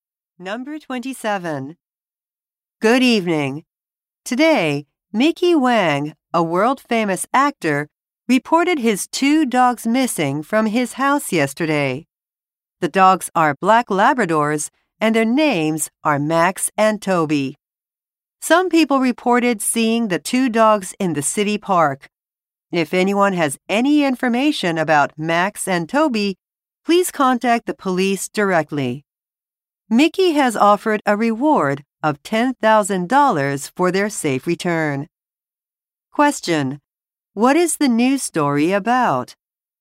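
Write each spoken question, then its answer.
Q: What is the news story about?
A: A famous actor's two missing dogs.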